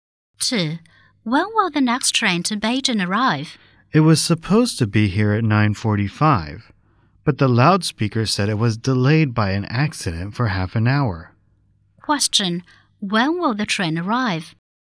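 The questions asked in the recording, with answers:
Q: When will the train arrive?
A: At 10:15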